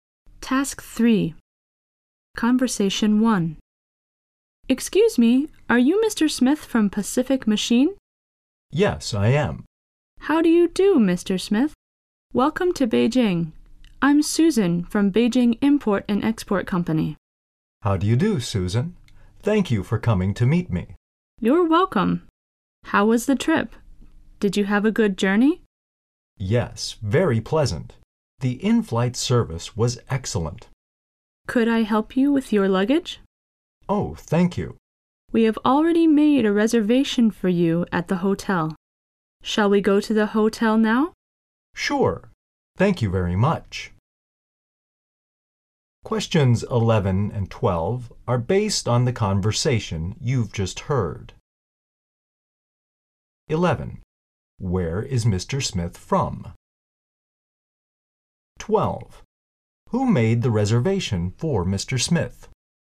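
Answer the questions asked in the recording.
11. Pacific Machine
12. Beijing Import and Export Company (Susan's company)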